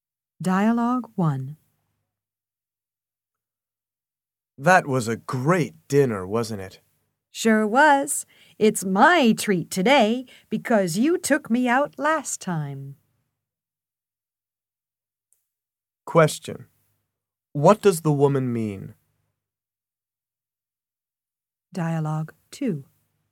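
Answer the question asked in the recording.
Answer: She will pay for dinner this time.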